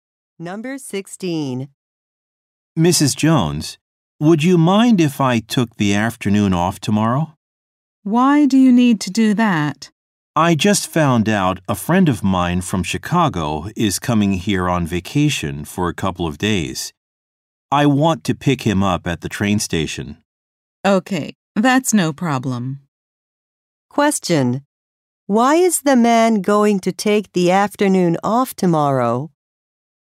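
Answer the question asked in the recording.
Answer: To pick up a friend at the train station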